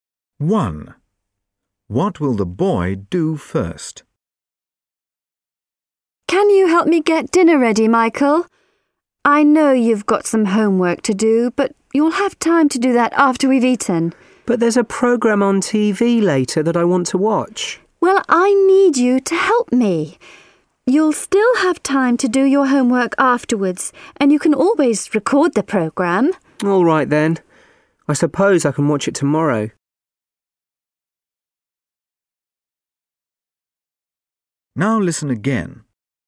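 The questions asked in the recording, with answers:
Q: What will the boy do first?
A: Help get dinner ready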